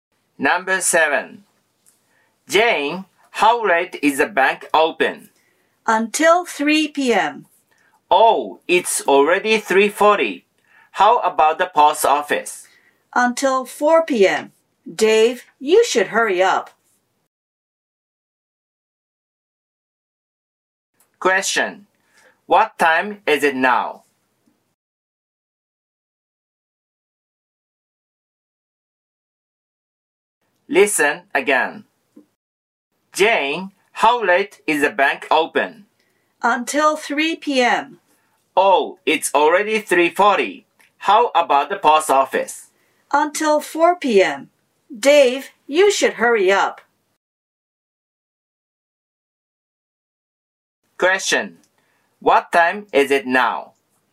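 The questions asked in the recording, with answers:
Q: What time is it now?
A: 3:40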